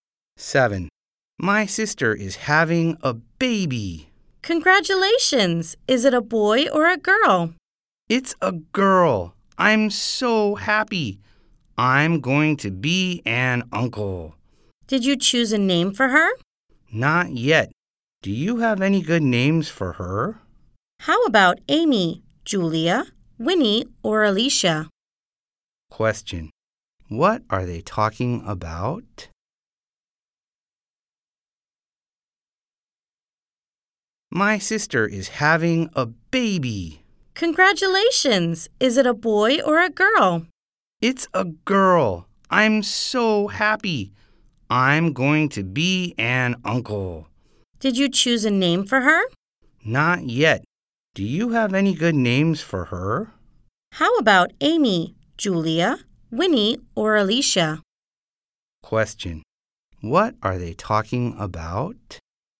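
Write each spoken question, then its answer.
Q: What are they talking about?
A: A name for the sister's new baby girl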